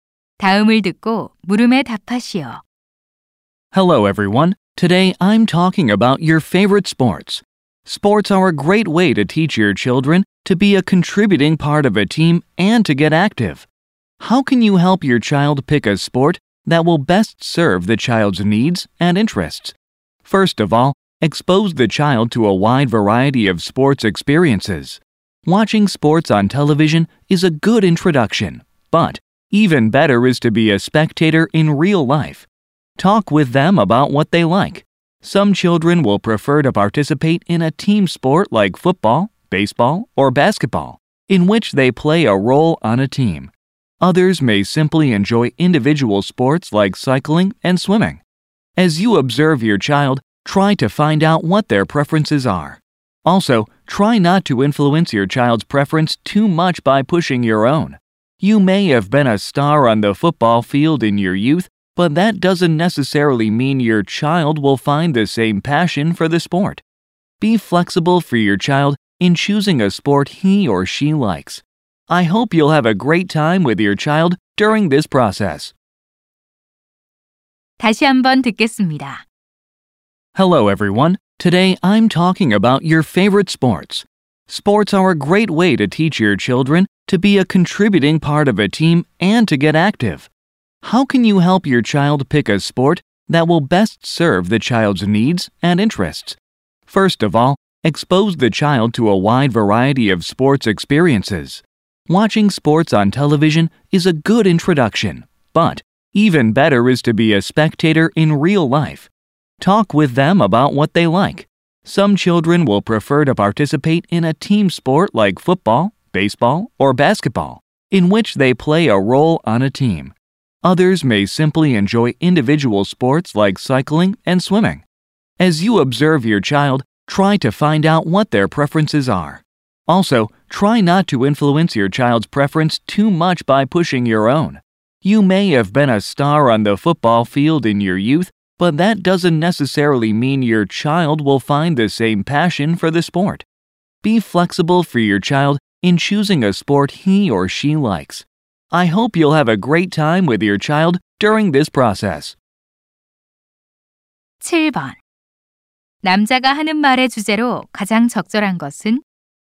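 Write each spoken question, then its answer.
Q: 남자가 하는 말의 주제로 가장 적절한 것은?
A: 자녀가 자신에게 맞는 운동을 고르도록 돕는 방법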